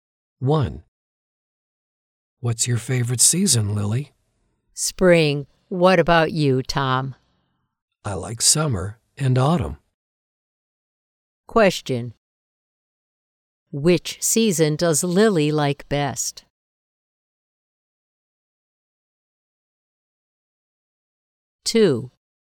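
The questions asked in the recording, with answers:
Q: Which season does Lily like best?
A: Spring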